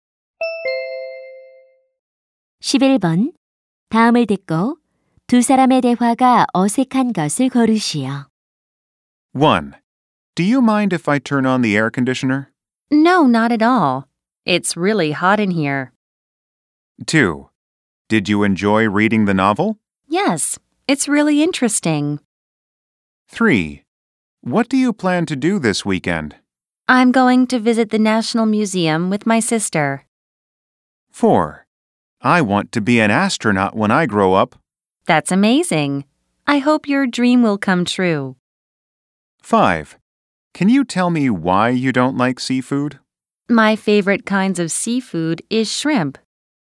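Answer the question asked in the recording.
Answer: 5: Can you tell me why you don't like seafood? / My favorite kinds of seafood is shrimp.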